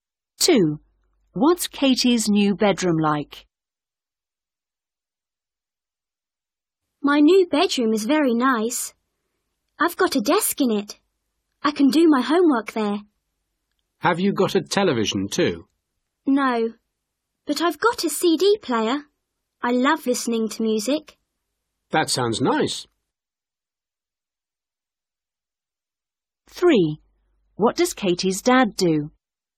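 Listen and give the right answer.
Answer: It has a desk and a CD player, but no television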